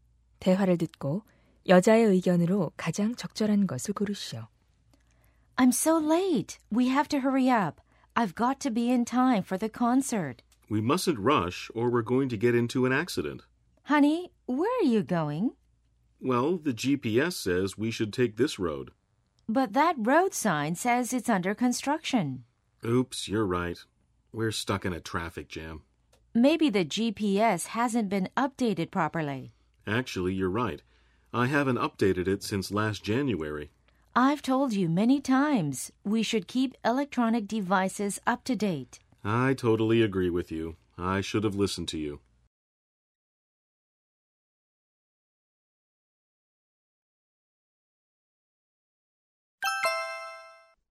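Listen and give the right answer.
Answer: 전자 기기는 최신 상태로 업데이트해야 한다.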